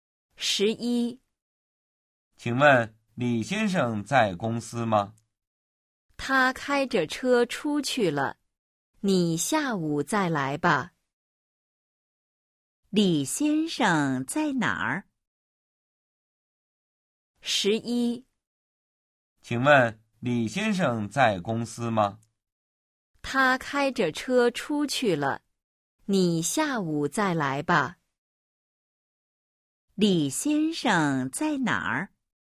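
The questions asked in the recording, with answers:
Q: 李先生在哪儿?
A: 开车出去了(不在公司)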